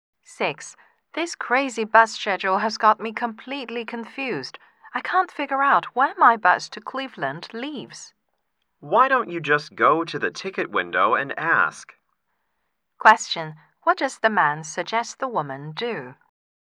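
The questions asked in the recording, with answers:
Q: What does the man suggest the woman do?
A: Ask at the ticket window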